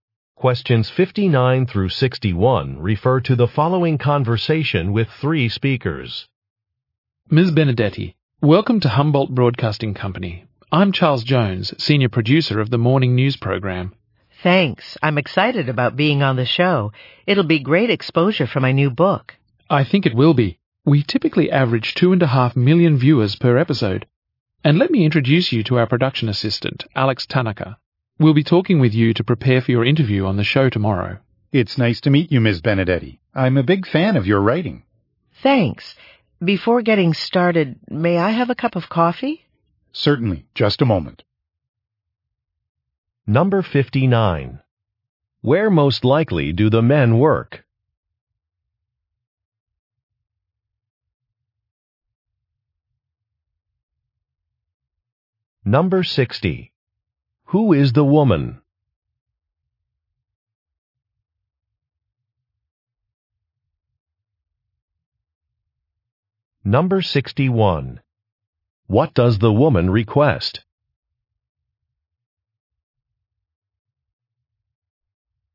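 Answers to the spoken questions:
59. At a broadcasting company
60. An author
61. A cup of coffee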